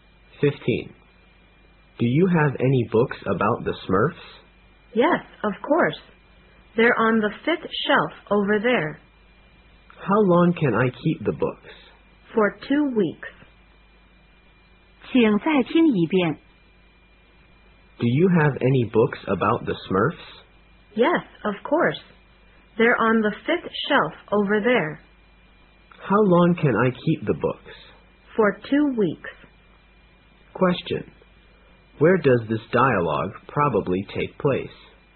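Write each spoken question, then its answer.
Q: Where does this dialogue probably take place?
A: In a library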